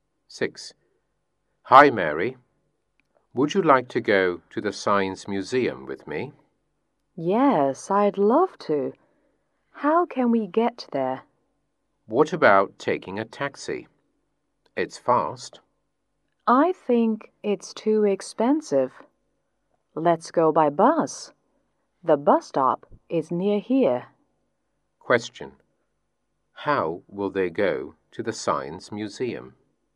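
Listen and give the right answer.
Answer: By bus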